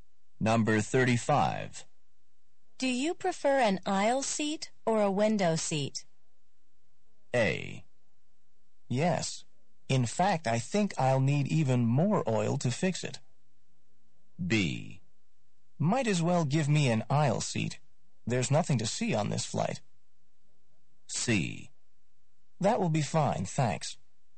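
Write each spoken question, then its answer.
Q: Do you prefer an aisle seat or a window seat?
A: B: Might as well give me an aisle seat.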